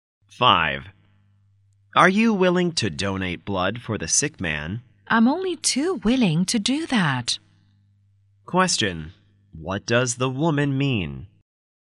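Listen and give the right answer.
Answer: She is very willing to donate blood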